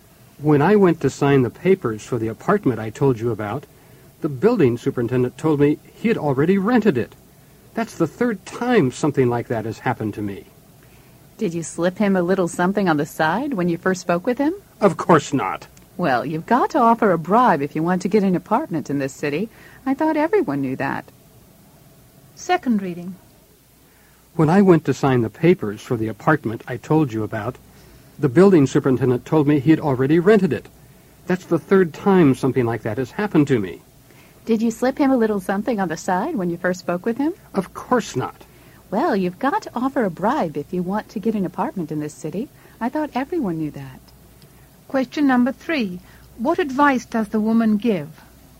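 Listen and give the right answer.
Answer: Offer the building superintendent a bribe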